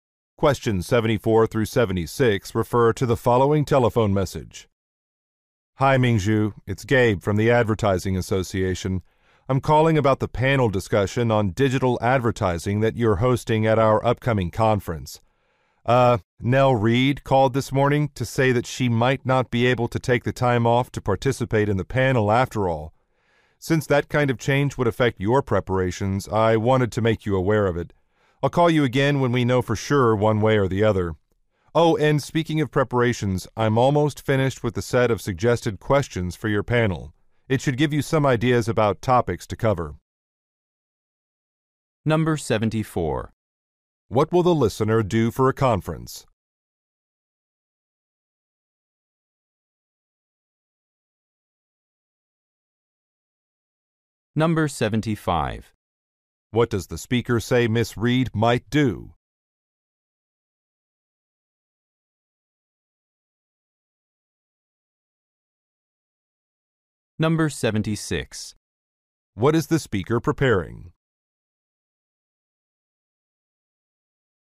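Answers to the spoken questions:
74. Host a panel discussion
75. Not participate in the panel
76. A set of suggested questions for the panel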